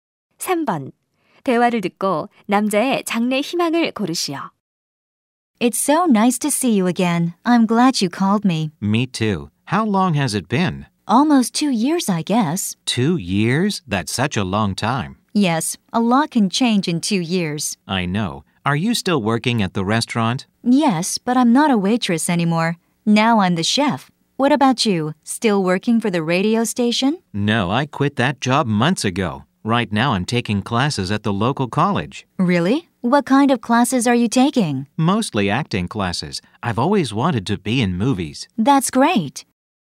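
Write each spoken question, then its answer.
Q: 대화를 듣고 남자의 장래 희망을 고르시오.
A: 영화배우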